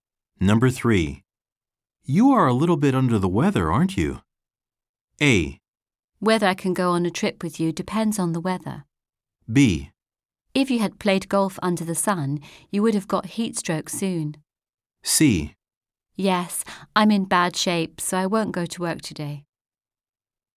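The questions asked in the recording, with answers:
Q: You are a little bit under the weather, aren't you?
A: C: Yes, I'm in bad shape, so I won't go to work today.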